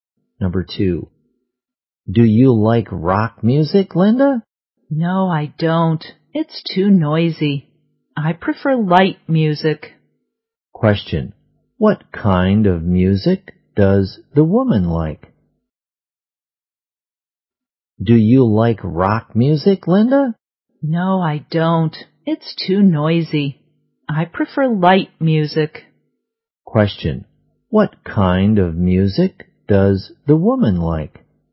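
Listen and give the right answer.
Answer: Light music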